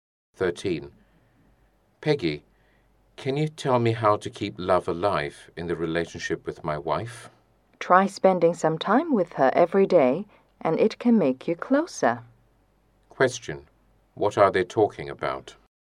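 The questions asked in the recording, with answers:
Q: What are they talking about?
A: How to keep love alive in a marriage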